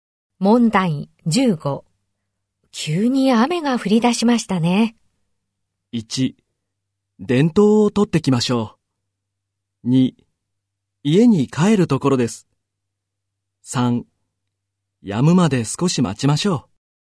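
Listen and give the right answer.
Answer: 3: 止むまで少し待ちましょう。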